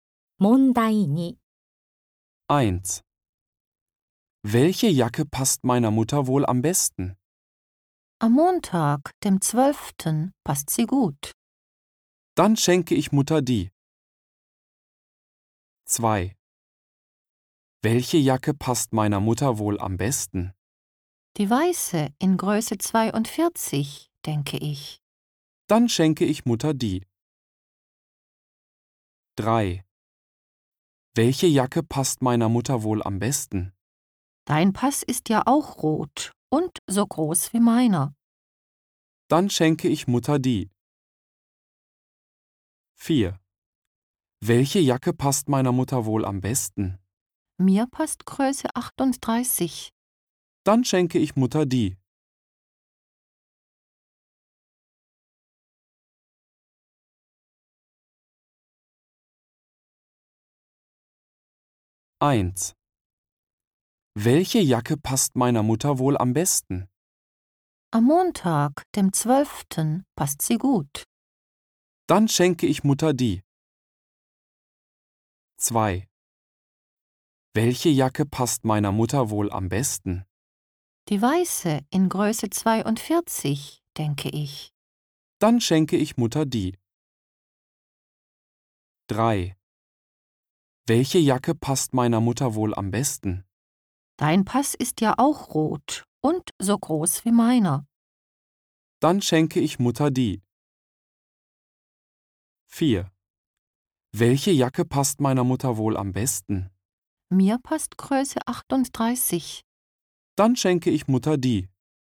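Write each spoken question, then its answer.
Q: Welche Jacke passt meiner Mutter wohl am besten?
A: 2: Die weiße in Größe 42, denke ich.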